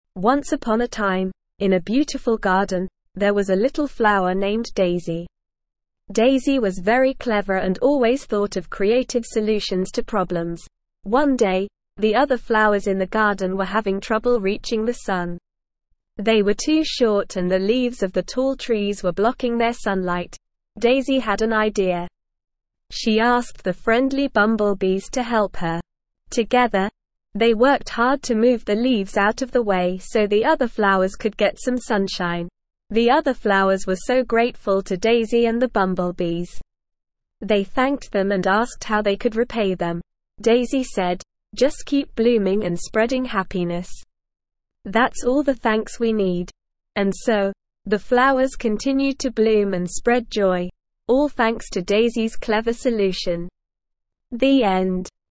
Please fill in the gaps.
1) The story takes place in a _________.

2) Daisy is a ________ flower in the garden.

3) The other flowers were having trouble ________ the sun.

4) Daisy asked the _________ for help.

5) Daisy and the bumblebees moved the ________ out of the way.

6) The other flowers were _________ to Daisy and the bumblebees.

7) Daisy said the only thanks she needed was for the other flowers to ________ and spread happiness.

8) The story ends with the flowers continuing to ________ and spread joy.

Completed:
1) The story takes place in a garden.
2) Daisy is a little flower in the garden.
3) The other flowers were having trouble reaching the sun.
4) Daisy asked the bumblebees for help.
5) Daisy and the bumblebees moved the leaves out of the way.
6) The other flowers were grateful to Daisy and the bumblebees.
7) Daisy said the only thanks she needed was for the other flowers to bloom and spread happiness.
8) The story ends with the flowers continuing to bloom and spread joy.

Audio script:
Once upon a time, in a beautiful garden, there was a little flower named Daisy. Daisy was very clever and always thought of creative solutions to problems.
One day, the other flowers in the garden were having trouble reaching the sun. They were too short and the leaves of the tall trees were blocking their sunlight.
Daisy had an idea. She asked the friendly bumblebees to help her. Together, they worked hard to move the leaves out of the way so the other flowers could get some sunshine.
The other flowers were so grateful to Daisy and the bumblebees. They thanked them and asked how they could repay them.
Daisy said, "Just keep blooming and spreading happiness. That's all the thanks we need."
And so, the flowers continued to bloom and spread joy, all thanks to Daisy's clever solution. The end.

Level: Level 1